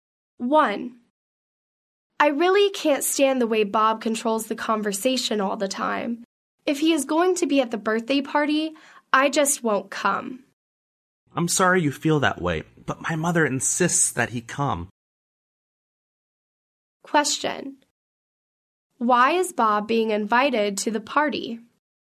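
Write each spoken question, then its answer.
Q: Why is Bob being invited to the party?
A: Because the speaker's mother insists that he come.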